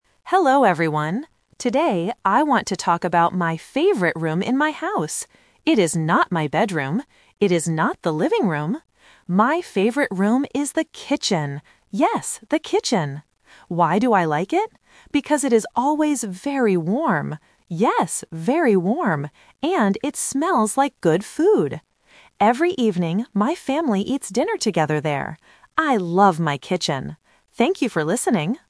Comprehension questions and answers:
Listen to the presentation and choose the correct answer (A, B, or C).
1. What is the student's favorite room?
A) The bedroom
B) The kitchen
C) The bathroom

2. Why does the student like this room?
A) Because it has a big TV.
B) Because it is very quiet.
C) Because it is very warm.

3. What does the family do in this room every evening?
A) They eat dinner.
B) They play games.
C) They sleep.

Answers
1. B
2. C
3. A

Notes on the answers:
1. The student clearly says, "My favorite room is the kitchen." Option (A) "The bedroom" is the trap because the student mentions it first but immediately rejects it ("It is not my bedroom"). Option (C) "The bathroom" is a plausible room but is never mentioned.
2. The student states the reason: "Because it is always very warm," and repeats the word "warm". Options (A) and (B) are plausible reasons to like a room, but they are not mentioned in the audio.
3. The student says, "Every evening, my family eats dinner together there." Option (B) "They play games" is plausible for family time but not mentioned. Option (C) "They sleep" is a trap related to the "bedroom" mentioned earlier in the speech.

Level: A1

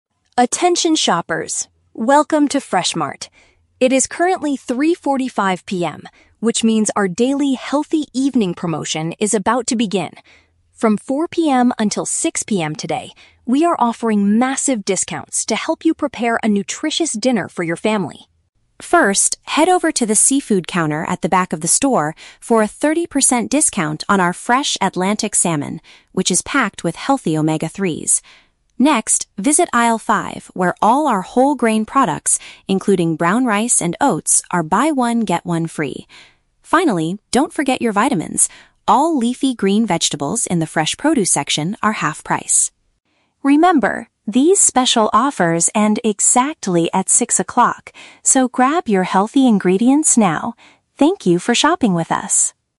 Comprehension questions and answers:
Listen to a public announcement in a supermarket. For each question, choose the correct answer (A, B, or C).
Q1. What is the main purpose of this announcement?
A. To inform customers that the supermarket will close at 6 PM.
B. To promote a temporary discount on nutritious grocery items.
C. To announce the opening of a new seafood counter.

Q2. What special deal is offered for the whole grain products?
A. They are sold at half of their original price today.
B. Customers receive an extra item for free when they purchase one.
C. They have a thirty percent discount until the evening.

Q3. According to the speaker, what health benefit does the Atlantic salmon provide?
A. It contains high amounts of essential daily vitamins.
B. It is the cheapest source of protein in the entire store.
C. It is extremely rich in a healthy substance called omega-3.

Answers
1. B
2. B
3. C

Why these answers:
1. The announcer says they are offering "massive discounts to help you prepare a nutritious dinner" from 4 PM to 6 PM (a temporary discount on nutritious grocery items). Option (A) is a trap; 6 PM is when the special offers end, not when the store closes. Option (C) is a trap; the seafood counter is mentioned as a location, but it is not newly opened.
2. The announcer states that whole grain products are "buy-one-get-one-free", which means receiving an extra item for free when purchasing one. Option (A) is a trap; the "half price" deal applies to the leafy green vegetables. Option (C) is a trap; the "thirty percent discount" applies to the fresh salmon.
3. The speaker explicitly states that the fresh Atlantic salmon is "packed with healthy omega-3s" (rich in a healthy substance). Option (A) is a trap; "vitamins" are mentioned, but they are associated with the leafy green vegetables, not the salmon. Option (B) is not mentioned in the audio.

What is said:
Announcer: Attention shoppers. Welcome to Fresh Mart. It is currently 3:45 PM, which means our daily "Healthy Evening" promotion is about to begin. From 4 PM until 6 PM today, we are offering massive discounts to help you prepare a nutritious dinner for your family.
First, head over to the seafood counter at the back of the store for a thirty percent discount on our fresh Atlantic salmon, which is packed with healthy omega-3s. Next, visit aisle five where all our whole grain products, including brown rice and oats, are buy-one-get-one-free. Finally, don't forget your vitamins! All leafy green vegetables in the fresh produce section are half price.
Remember, these special offers end exactly at six o'clock, so grab your healthy ingredients now. Thank you for shopping with us!

